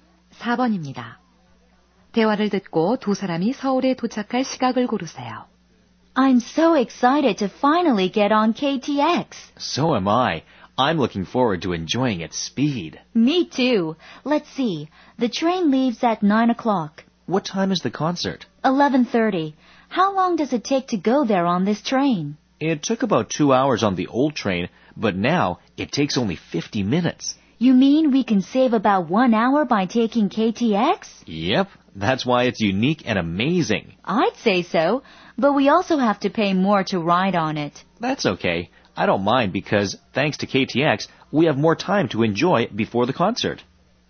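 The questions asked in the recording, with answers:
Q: 대화를 듣고 두 사람이 서울에 도착할 시각을 고르세요.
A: 9시 50분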